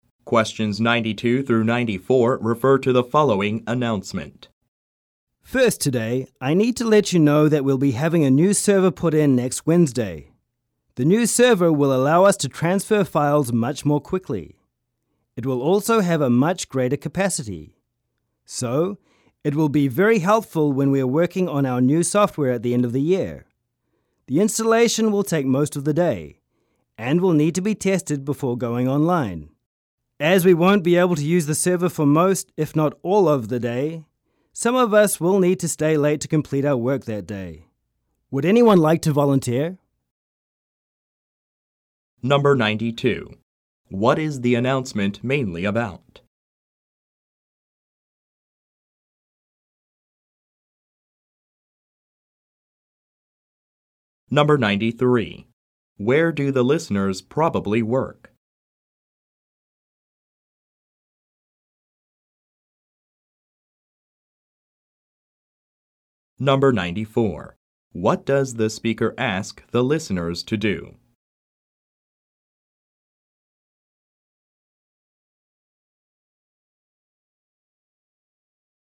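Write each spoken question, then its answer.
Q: What is the announcement mainly about?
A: Installing a new server

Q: What does the speaker ask the listeners to do?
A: Volunteer to stay late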